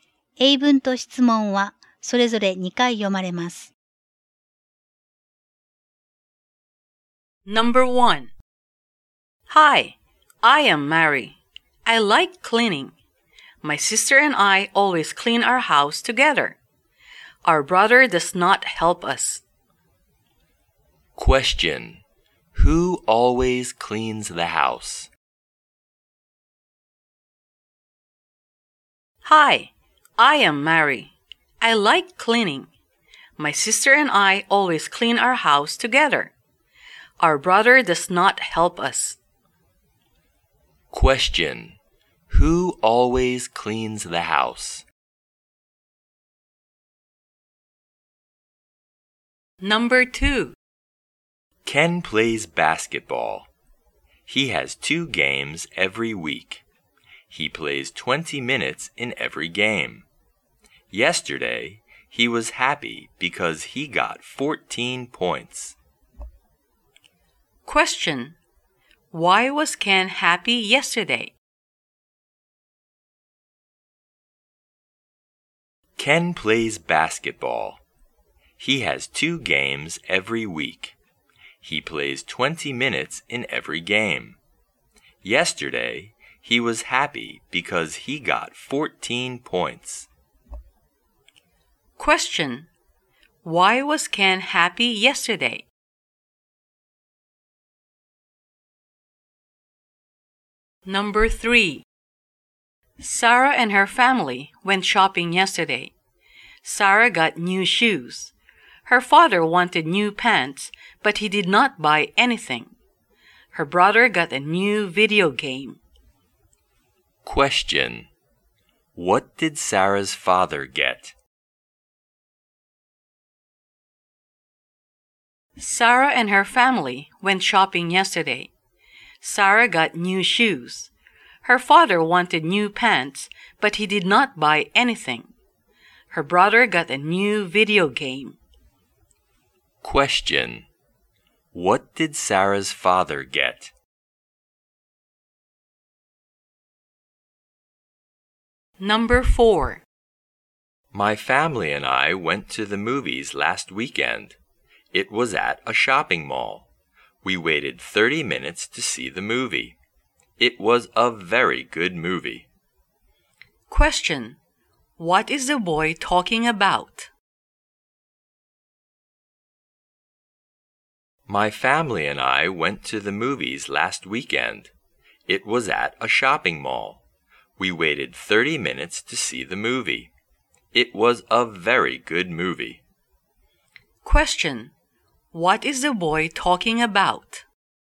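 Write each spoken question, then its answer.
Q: Who always cleans the house?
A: Mary and her sister

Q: Why was Ken happy yesterday?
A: Because he got 14 points

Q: What did Sarah's father get?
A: Nothing

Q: What is the boy talking about?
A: Going to the movies with his family last weekend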